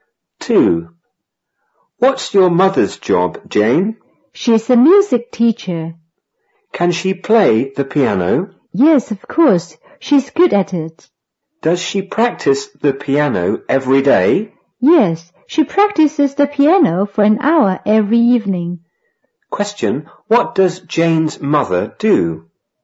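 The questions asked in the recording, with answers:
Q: Question, what does Jane's mother do?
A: She's a music teacher.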